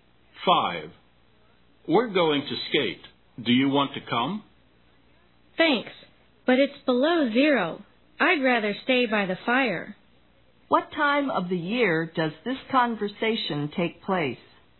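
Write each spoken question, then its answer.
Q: What time of the year does this conversation take place?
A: Winter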